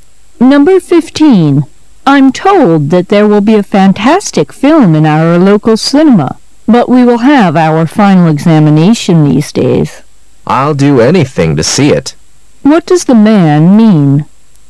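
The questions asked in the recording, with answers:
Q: What does the man mean?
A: He's determined to see the film even though his exams are coming up.

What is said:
[解析] W: I'm told that there will be a fantastic film in our local cinema,but we will have our final examination these days. M: I'll do anything to see it. Q: What does the man mean?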